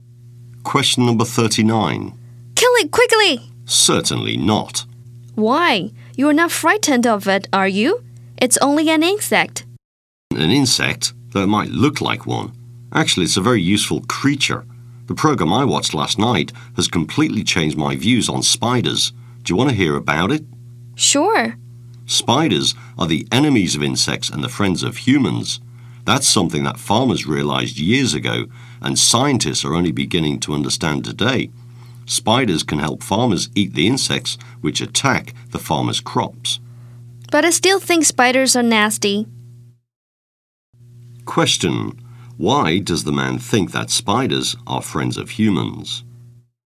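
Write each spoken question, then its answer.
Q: Why does the man think that spiders are friends of humans?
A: Because spiders eat the insects that attack farmers' crops.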